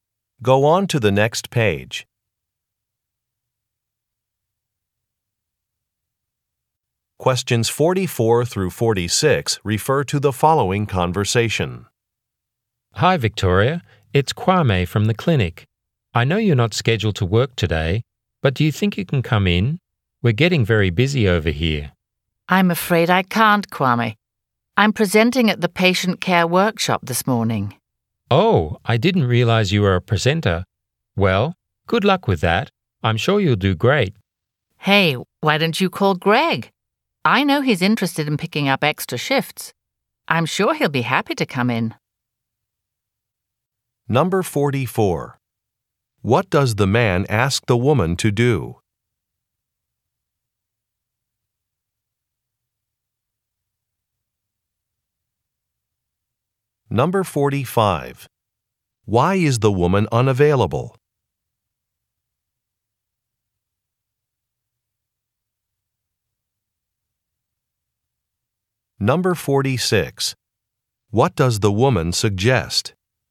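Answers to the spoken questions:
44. Come in to work
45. She is presenting at a workshop
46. Calling Greg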